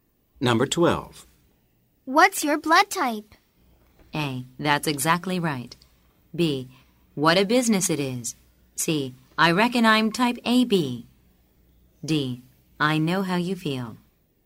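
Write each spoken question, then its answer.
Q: What's your blood type?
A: C: I reckon I'm type AB.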